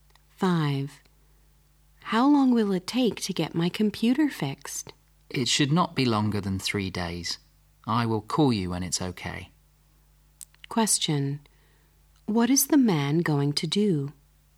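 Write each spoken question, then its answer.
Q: What is the man going to do?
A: Fix the computer and call when it's ready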